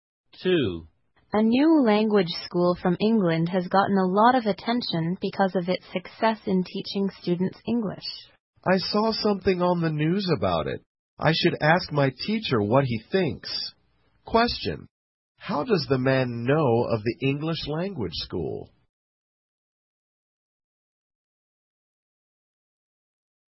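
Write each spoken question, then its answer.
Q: how does the man know of the English language school?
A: He saw something about it on the news.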